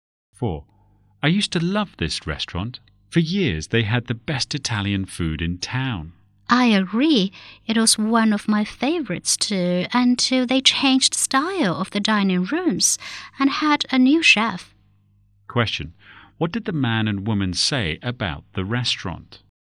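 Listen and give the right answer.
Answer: It is not as good as it used to be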